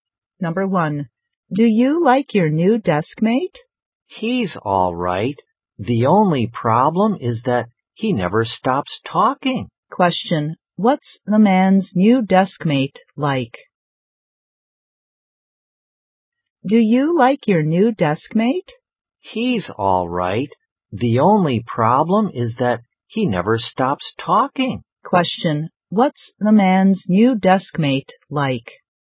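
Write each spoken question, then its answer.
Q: what's the man's new deskmate like?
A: He's talkative; he never stops talking.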